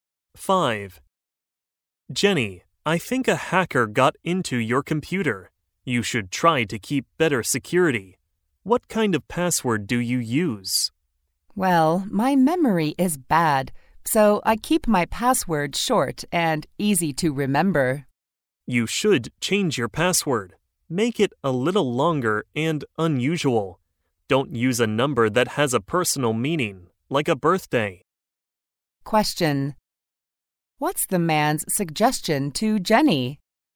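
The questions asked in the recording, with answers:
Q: What's the man's suggestion to Jenny?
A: Change her password to a longer, unusual one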